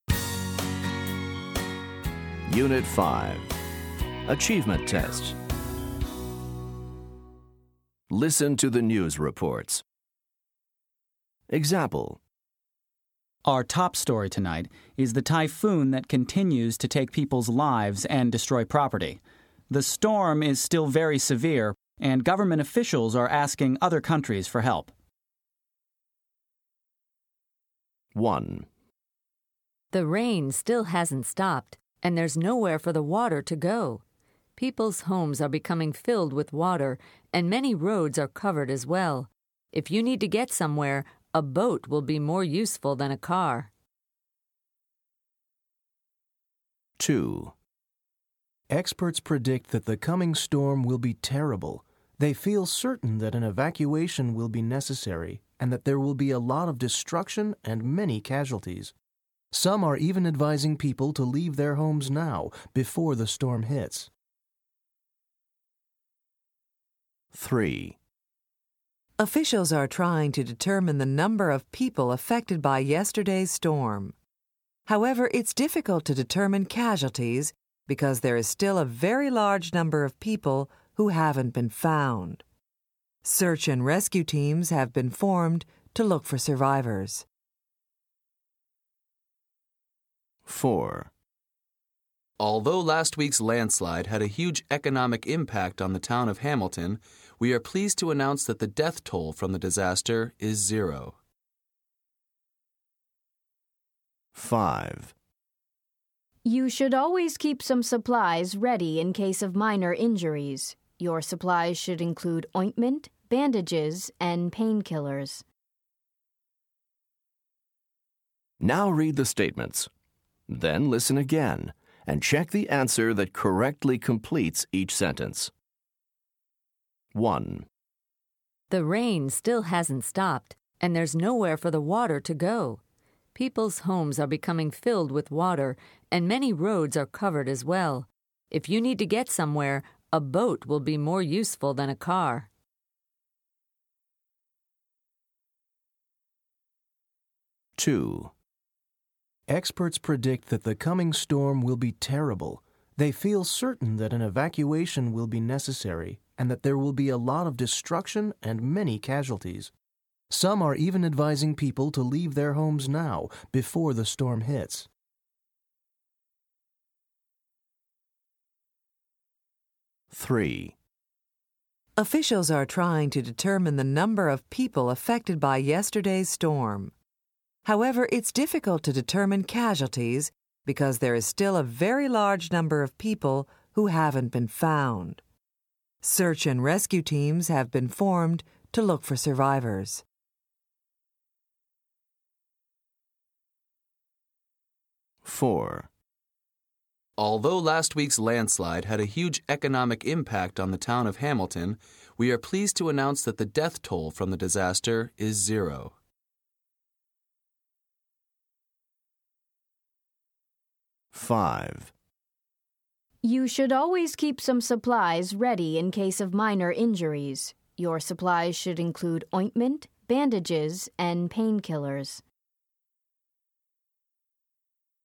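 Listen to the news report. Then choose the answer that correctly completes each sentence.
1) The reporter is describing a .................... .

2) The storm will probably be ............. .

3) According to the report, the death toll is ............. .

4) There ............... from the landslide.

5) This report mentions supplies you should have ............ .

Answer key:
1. flood
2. terrible
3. unknown
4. were no deaths
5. in case of minor injuries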